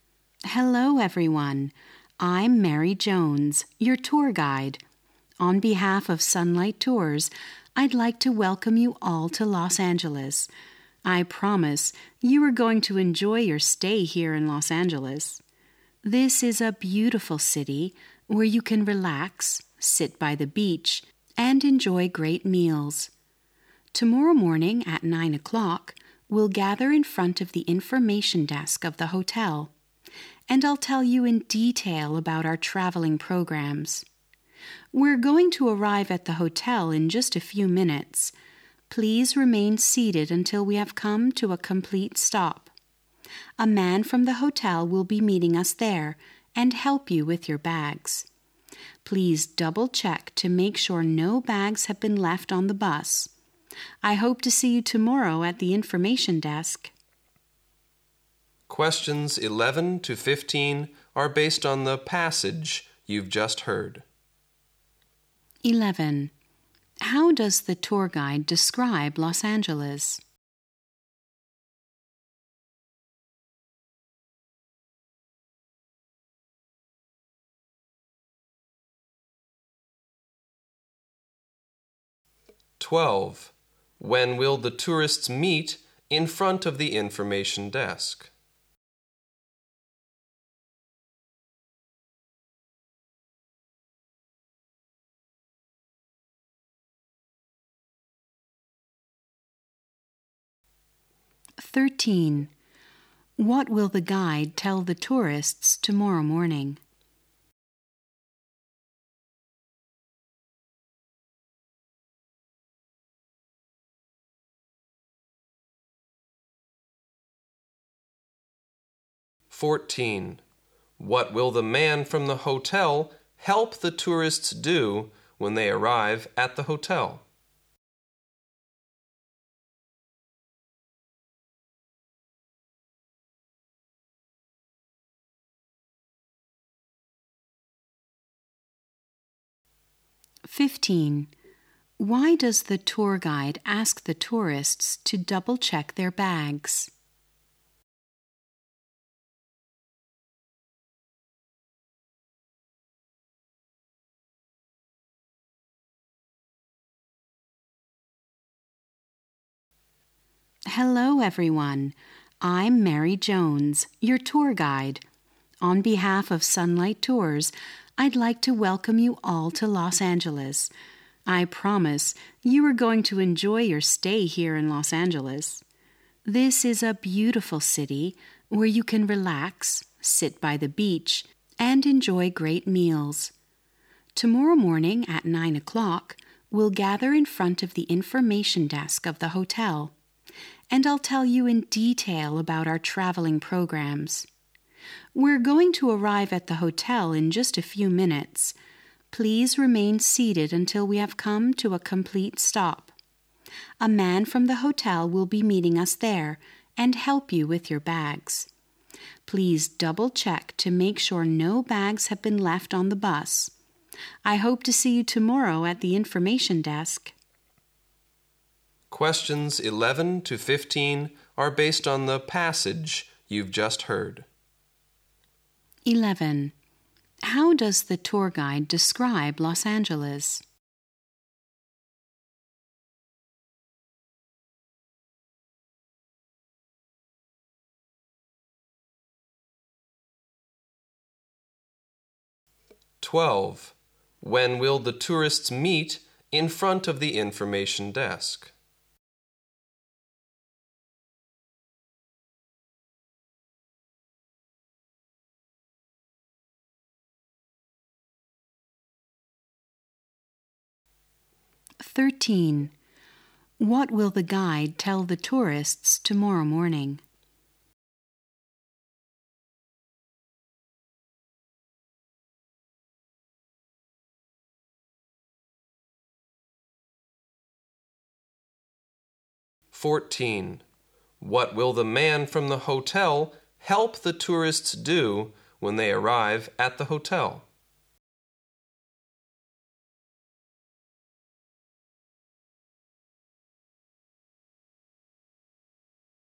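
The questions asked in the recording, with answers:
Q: 11. How does the tour guide describe Los Angeles?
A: A beautiful city

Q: 12. When will the tourists meet in front of the information desk?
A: At 9 o'clock tomorrow morning

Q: 13. What will the guide tell the tourists tomorrow morning?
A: Details about the travel programs

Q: 14. What will the man from the hotel help the tourists do when they arrive at the hotel?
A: Help them with their bags

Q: 15. Why does the tour guide ask the tourists to double-check their bags?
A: To make sure no bags are left on the bus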